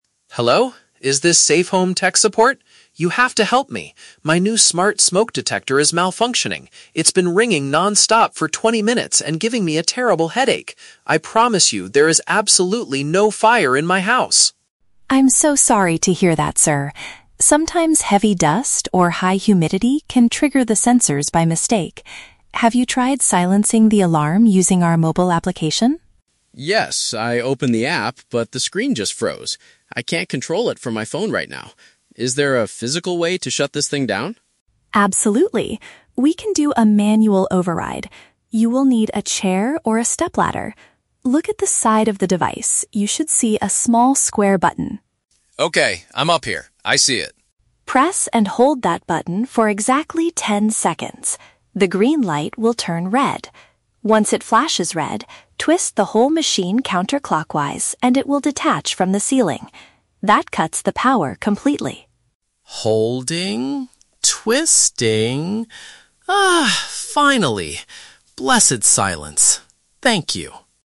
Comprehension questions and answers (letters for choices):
Listen to a conversation between a homeowner and a tech support agent. For each question, choose the correct answer (A, B, or C).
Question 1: Why is the man calling the support line?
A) Because his kitchen is currently catching on fire.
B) Because a piece of equipment is making an annoying noise.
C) Because his mobile phone was damaged by high humidity.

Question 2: Why couldn't the man fix the problem himself at first?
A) He did not have a ladder tall enough to reach the ceiling.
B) He forgot the password to his smart home account.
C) The software program on his smartphone stopped responding.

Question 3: What is the final step to completely turn off the device?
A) Push a square button continuously for ten seconds.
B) Rotate the machine in a specific direction to remove it.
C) Wait for the indicator light to change from red to green.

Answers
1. B
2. C
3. B

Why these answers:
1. Mark complains that his "smart smoke detector is malfunctioning" and has been "ringing non-stop." Option (B) correctly paraphrases this situation ("piece of equipment" = "smoke detector", "annoying noise" = "ringing non-stop/giving a headache"). Option (A) is a trap; he explicitly says, "there is absolutely no fire in my house." Option (C) is a trap; "high humidity" is mentioned by Lisa as a reason for the false alarm, not something that broke his phone.
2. Mark says, "I opened the app, but the screen just froze." Option (C) uses synonyms ("software program" for "app", "stopped responding" for "froze"). Option (A) is a trap; a ladder is needed later for the manual override, but it wasn't the reason he couldn't fix it initially. Option (B) sounds like a common tech problem but is not mentioned in the audio.
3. Lisa's final instruction to cut the power is to "twist the whole machine counter-clockwise, and it will detach." Option (B) paraphrases this perfectly ("Rotate" for "twist", "specific direction" for "counter-clockwise", "remove it" for "detach"). Option (A) is a trap; pressing the button is the first step of the override, not the final step. Option (C) is a trap; the light changes from green to red, not red to green.

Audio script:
You have to help me. My new smart smoke detector is malfunctioning. It's been ringing non-stop for twenty minutes and giving me a terrible headache! I promise you, there is absolutely no fire in my house.
Lisa: I'm so sorry to hear that, sir. Sometimes heavy dust or high humidity can trigger the sensors by mistake. Have you tried silencing the alarm using our mobile application?
Mark: Yes, I opened the app, but the screen just froze. I can't control it from my phone right now. Is there a physical way to shut this thing down?
Lisa: Absolutely. We can do a manual override. You will need a chair or a step ladder. Look at the side of the device, you should see a small square button.
Mark: Okay, I'm up here. I see it.
Lisa: Press and hold that button for exactly ten seconds. The green light will turn red. Once it flashes red, twist the whole machine counter-clockwise, and it will detach from the ceiling. That cuts the power completely.
Mark: Holding... twisting... Ah, finally! Blessed silence. Thank you!